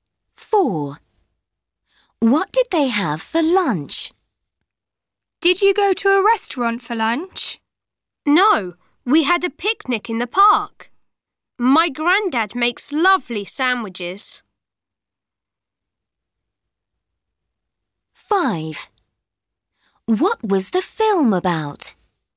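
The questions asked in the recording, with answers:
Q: What did they have for lunch?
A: A picnic with sandwiches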